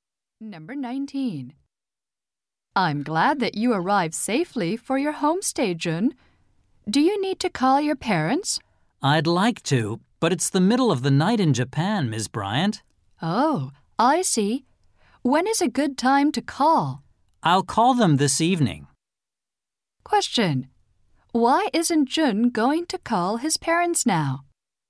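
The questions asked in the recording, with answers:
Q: Question. Why isn't Jun going to call his parents now?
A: It's the middle of the night in Japan.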